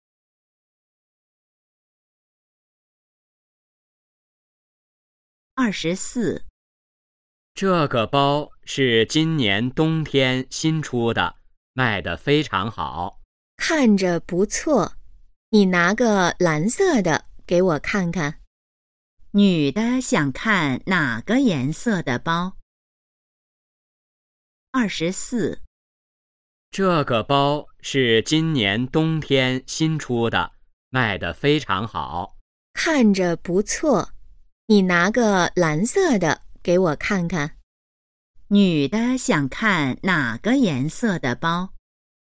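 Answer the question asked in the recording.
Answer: 蓝色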